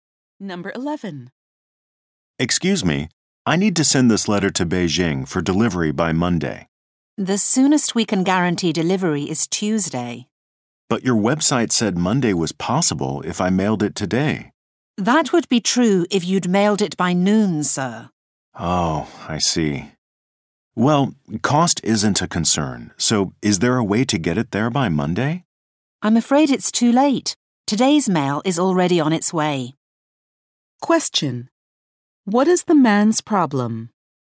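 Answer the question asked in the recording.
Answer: His letter cannot reach Beijing by Monday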